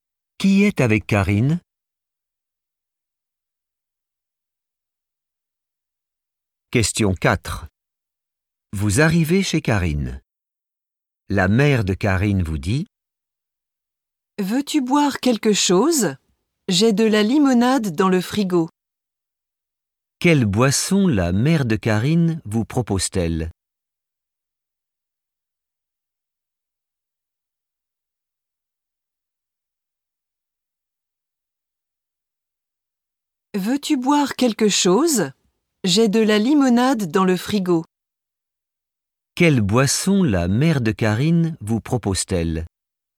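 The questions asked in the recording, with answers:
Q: Quelle boisson la mère de Karine vous propose-t-elle?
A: de la limonade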